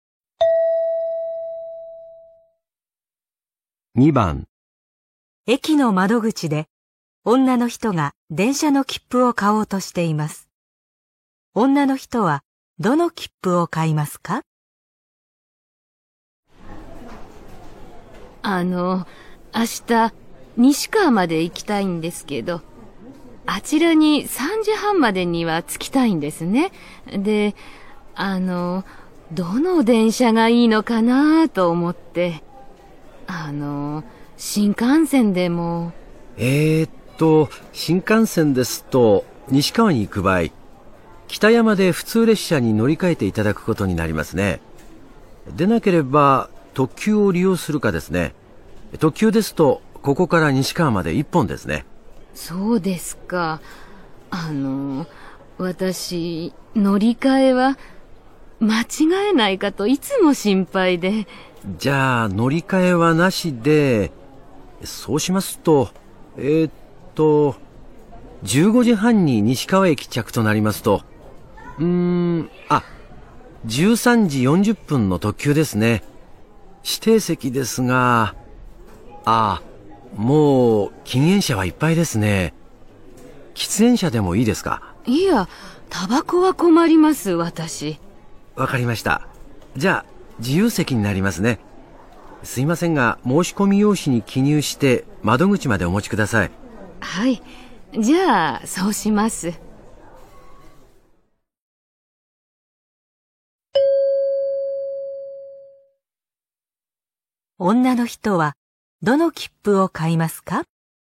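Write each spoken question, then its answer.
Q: 女の人はどの切符を買いますか?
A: 13時40分の特急の自由席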